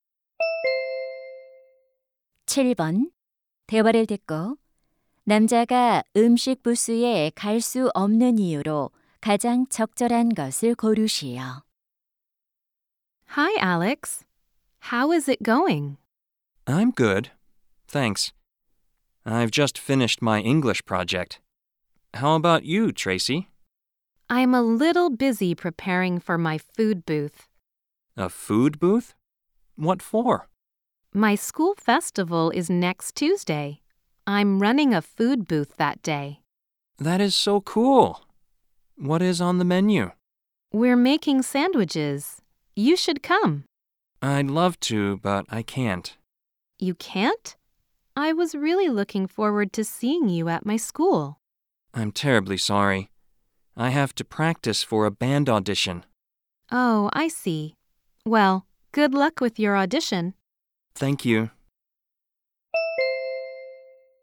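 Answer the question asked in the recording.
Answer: 밴드 오디션 연습을 해야 해서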